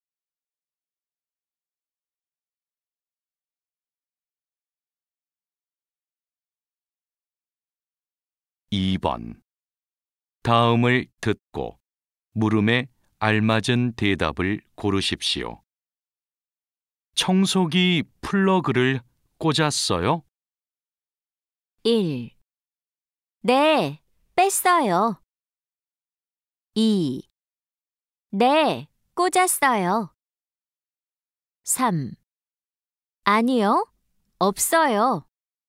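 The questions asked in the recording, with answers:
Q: 청소기 플러그를 꽂았어요?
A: 2: 네, 꽂았어요.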